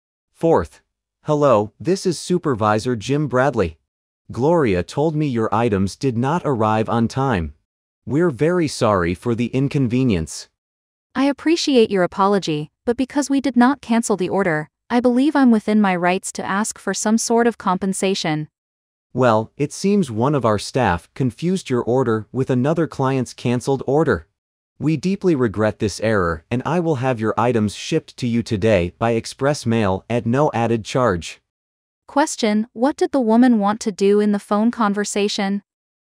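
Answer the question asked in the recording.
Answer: Ask for compensation for the late delivery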